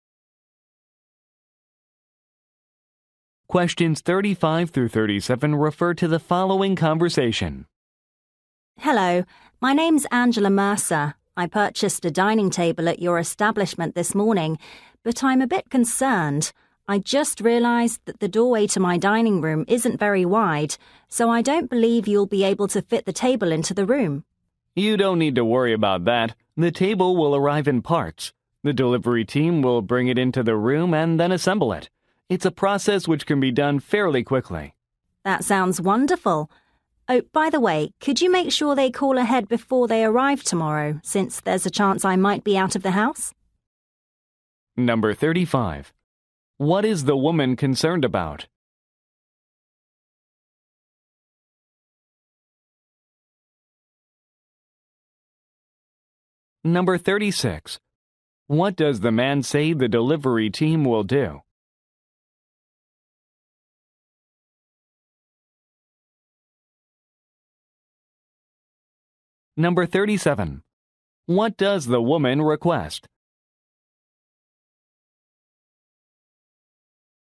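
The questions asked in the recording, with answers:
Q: What is the woman concerned about?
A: The table won't fit through her narrow doorway

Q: What does the man say the delivery team will do?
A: Assemble the table in the room

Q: What does the woman request?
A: That the delivery team call before arriving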